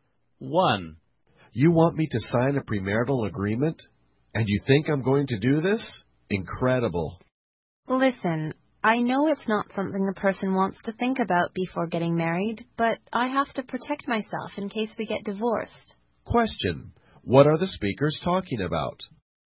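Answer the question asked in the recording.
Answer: A premarital agreement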